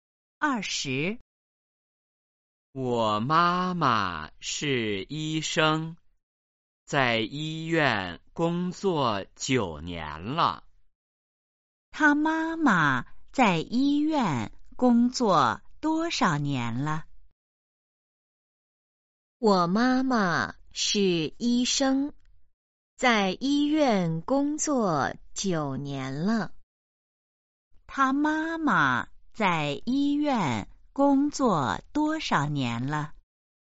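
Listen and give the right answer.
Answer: 九年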